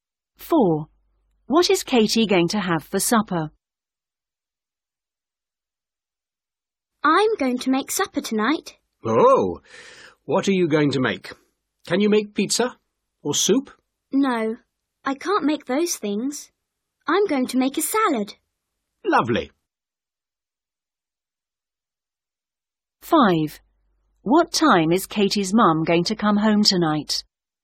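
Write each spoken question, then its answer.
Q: What is Katie going to have for supper?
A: A salad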